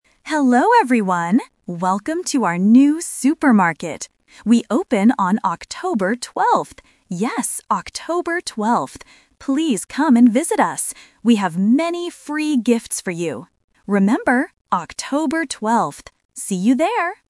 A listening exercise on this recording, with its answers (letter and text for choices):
Listen to the announcement. Choose the correct answer (A, B, or C) for each question.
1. What place is opening?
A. A new school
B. A new supermarket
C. A new hospital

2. When is the opening day?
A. October 12th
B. October 20th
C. October 10th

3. What do they have for the customers?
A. Free food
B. Free drinks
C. Free gifts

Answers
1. B. A new supermarket
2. A. October 12th
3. C. Free gifts

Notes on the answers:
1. The voiceover clearly says, "Welcome to our new supermarket." Options (A) and (C) are not mentioned at all.
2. The speaker repeats the date "October 12th" three times in the audio. Option (B) "20th" and Option (C) "10th" are traps because the numbers might sound confusing to beginners, but they are incorrect.
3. The speaker says, "We have many free gifts for you." Option (A) and (B) are traps because people often think of food or drinks when talking about a supermarket, but the audio does not mention them.

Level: A1